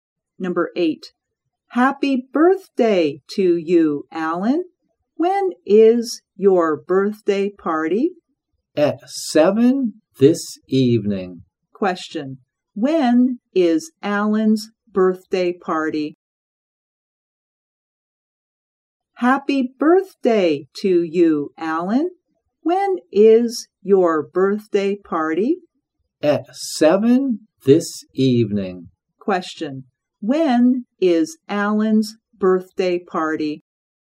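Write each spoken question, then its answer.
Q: Question. When is Alan's birthday party?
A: At 7 this evening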